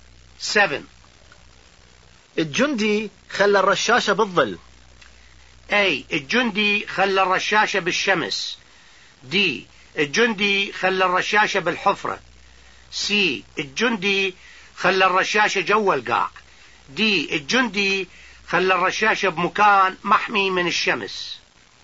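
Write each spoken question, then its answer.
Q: الجندي خلى الرشاشة بالظل.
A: D: الجندي خلى الرشاشة بمكان محمي من الشمس.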